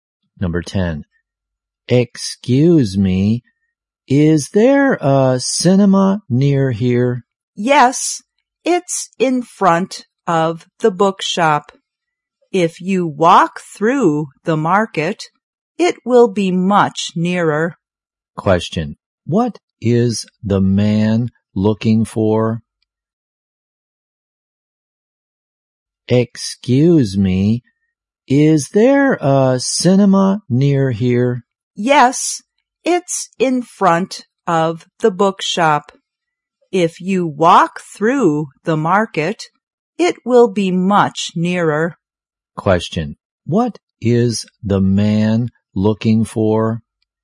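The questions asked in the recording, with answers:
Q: Question. What is the man looking for?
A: A cinema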